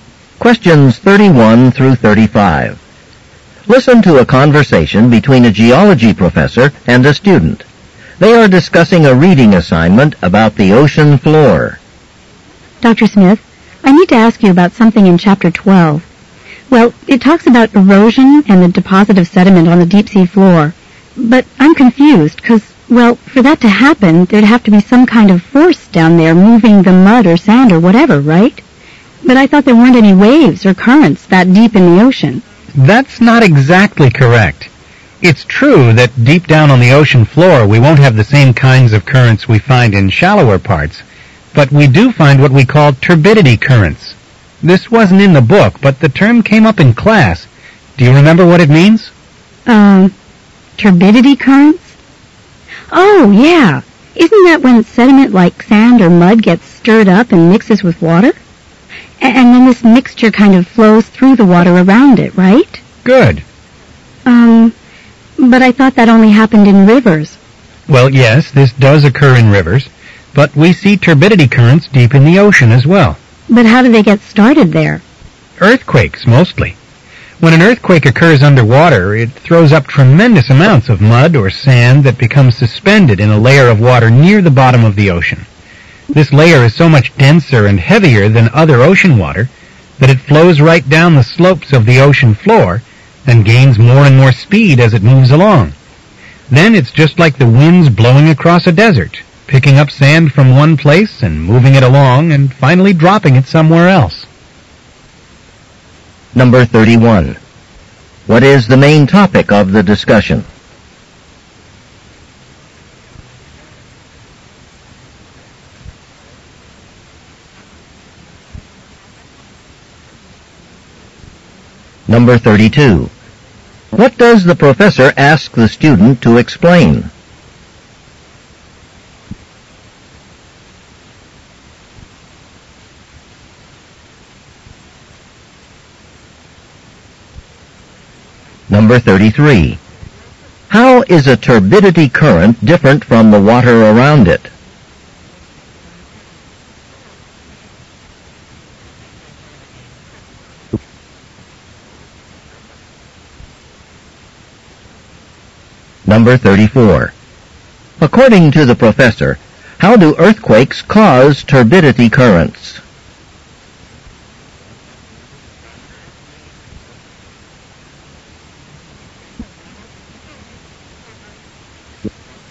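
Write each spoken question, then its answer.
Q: What is the main topic of the discussion?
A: Turbidity currents on the deep ocean floor.

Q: What does the professor ask the student to explain?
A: What the term turbidity current means.

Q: How is a turbidity current different from the water around it?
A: It is denser and heavier.

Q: According to the professor, how do earthquakes cause turbidity currents?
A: They throw up mud or sand that becomes suspended in the water near the bottom.

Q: Why does the professor mention desert winds?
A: To compare how the currents move sediment from one place to another.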